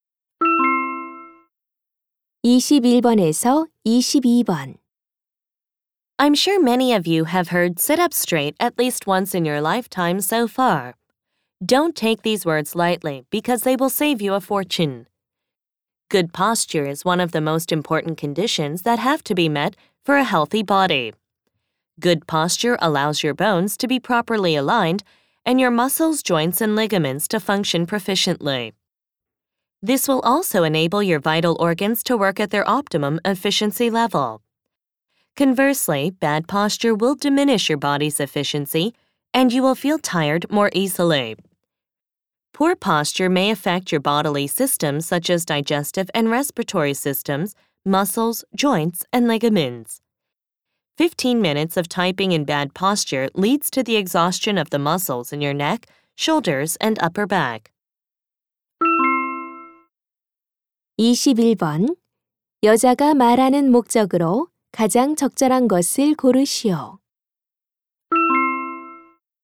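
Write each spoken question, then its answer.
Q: 여자가 말하는 목적으로 가장 적절한 것을 고르시오.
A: 바른 자세의 중요성을 강조하려고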